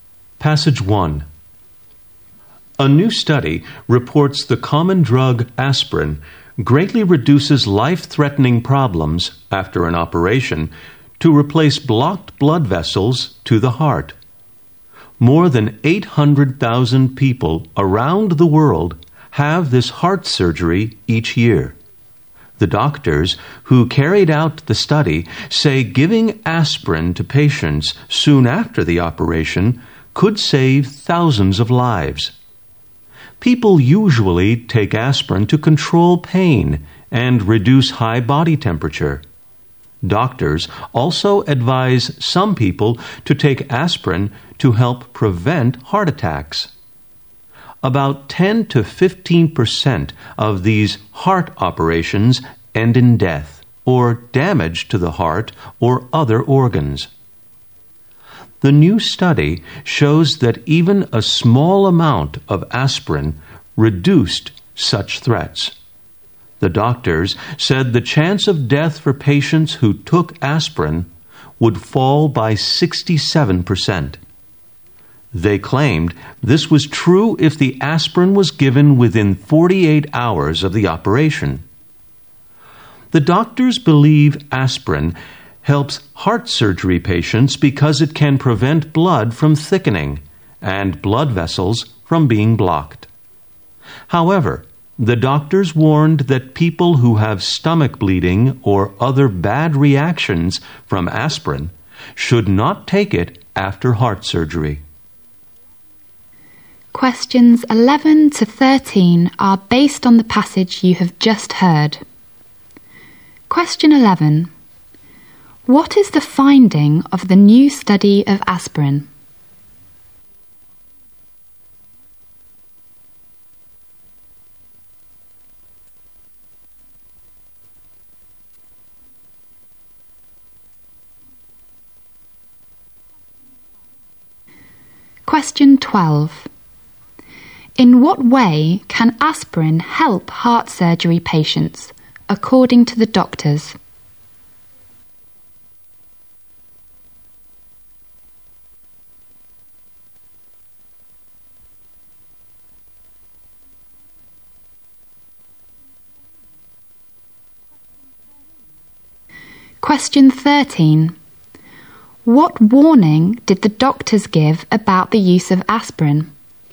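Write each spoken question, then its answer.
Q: What is the finding of the new study of aspirin?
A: Aspirin greatly reduces life-threatening problems after heart bypass surgery

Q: In what way can aspirin help heart surgery patients, according to the doctors?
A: It prevents blood from thickening and blood vessels from being blocked

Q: What warning did the doctors give about the use of aspirin?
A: People with stomach bleeding or bad reactions to aspirin should not take it after surgery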